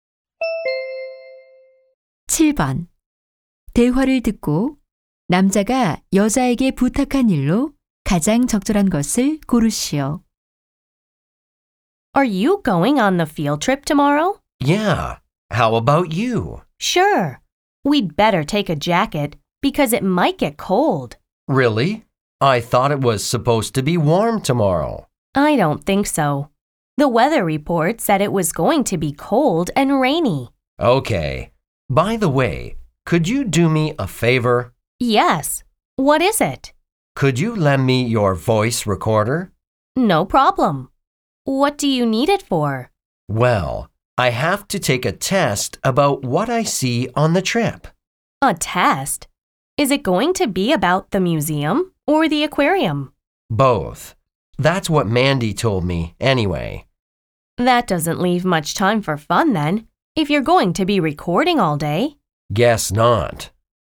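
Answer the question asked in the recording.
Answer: 음성 녹음기 빌려주기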